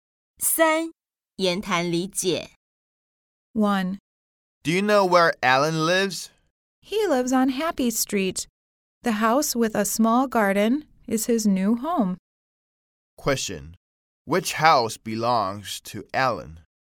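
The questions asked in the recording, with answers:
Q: Which house belongs to Alan?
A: The house with a small garden on Happy Street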